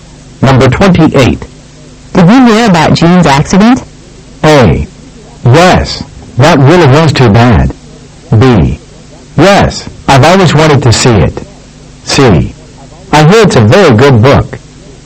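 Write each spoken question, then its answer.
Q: Did you hear about Jean's accident?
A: A: Yes, that really was too bad.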